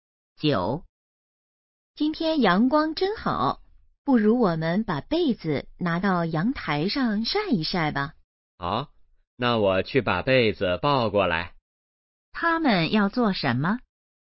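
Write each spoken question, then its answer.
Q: 他们要做什么?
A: 晒被子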